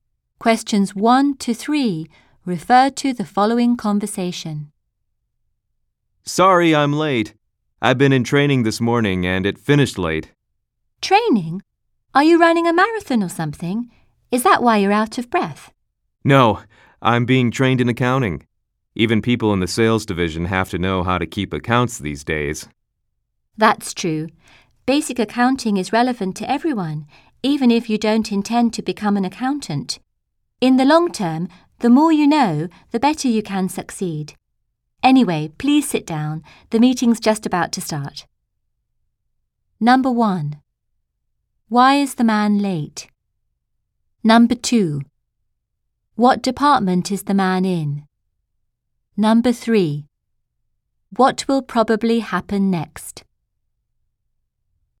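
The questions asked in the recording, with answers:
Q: Why is the man late?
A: His accounting training finished late

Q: What will probably happen next?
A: A meeting will start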